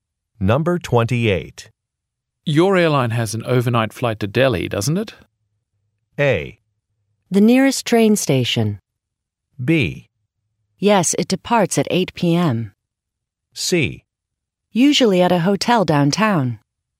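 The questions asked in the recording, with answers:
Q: Your airline has an overnight flight to Delhi, doesn't it?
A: B: Yes, it departs at 8 p.m.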